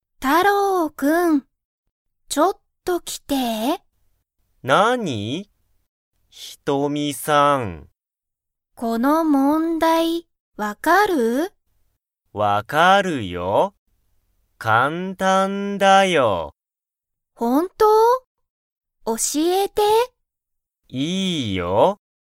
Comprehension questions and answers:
タロウは、その問題(もんだい)がわかりますか?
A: はい

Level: Level 1